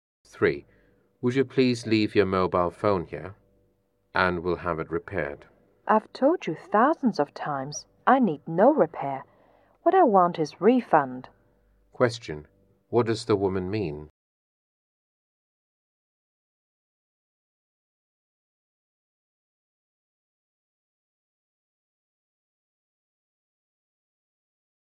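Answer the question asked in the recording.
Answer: She wants a refund, not a repair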